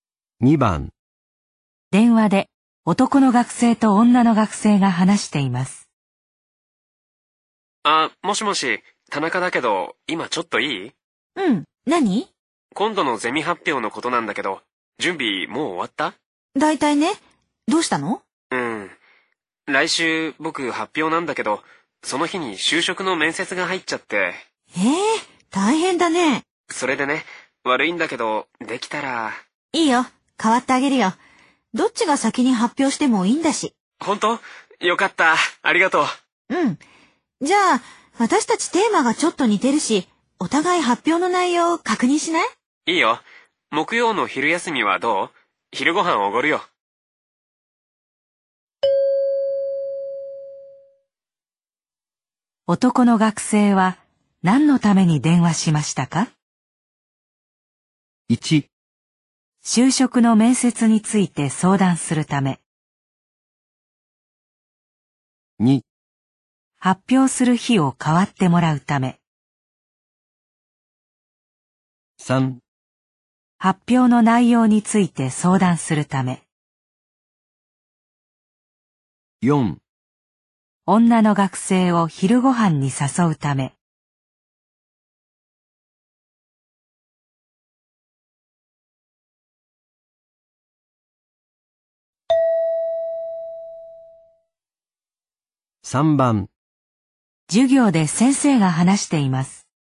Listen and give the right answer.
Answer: 2

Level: N2 Listening · Test 12